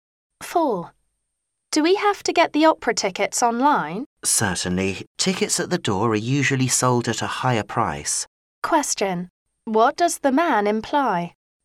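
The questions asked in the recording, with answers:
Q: What does the man imply?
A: Buying tickets online is cheaper than at the door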